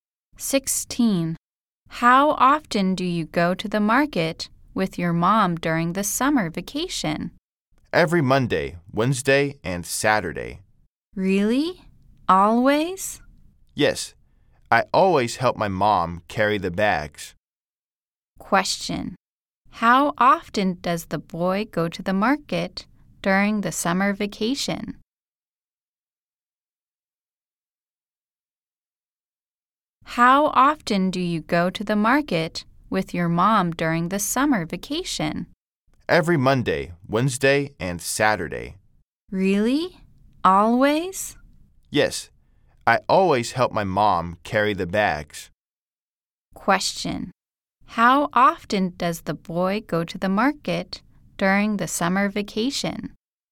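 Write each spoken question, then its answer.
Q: How often does the boy go to the market during the summer vacation?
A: Three times a week (Monday, Wednesday, and Saturday)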